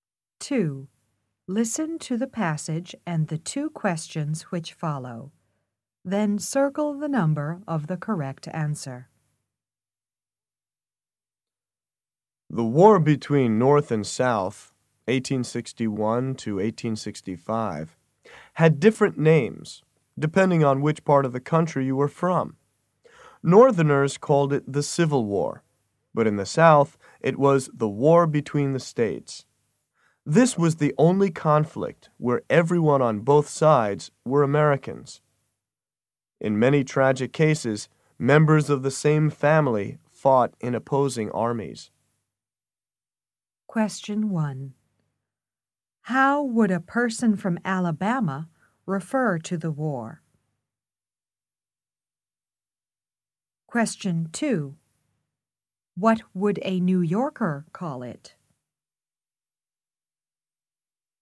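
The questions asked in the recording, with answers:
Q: How would a person from Alabama refer to the war?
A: The War Between the States

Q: What would a New Yorker call it?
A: The Civil War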